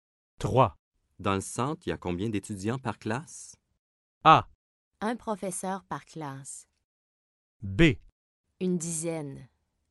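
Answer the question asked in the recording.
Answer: B: Une dizaine.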